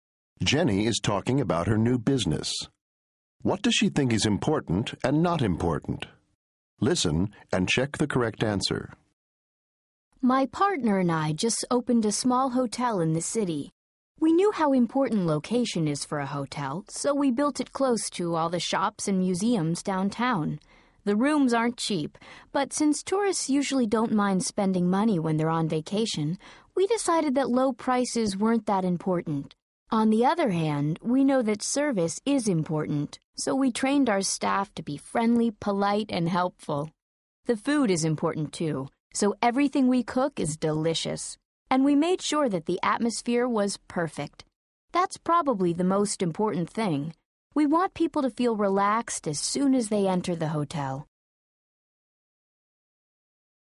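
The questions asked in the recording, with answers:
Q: What does she think is important and not important?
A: Important: location, service, food, atmosphere (most important). Not important: low prices.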